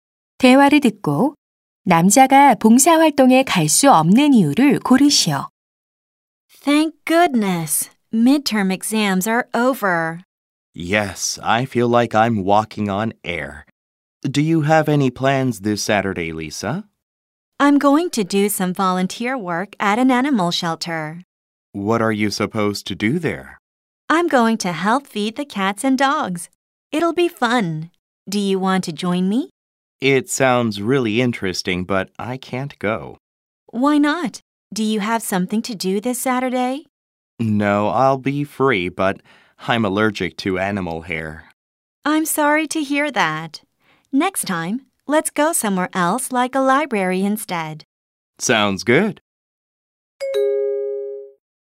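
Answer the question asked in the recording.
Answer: 동물 털 알레르기가 있어서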